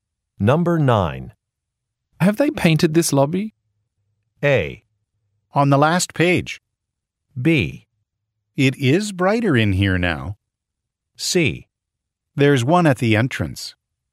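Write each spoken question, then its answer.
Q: Have they painted this lobby?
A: B: It is brighter in here now.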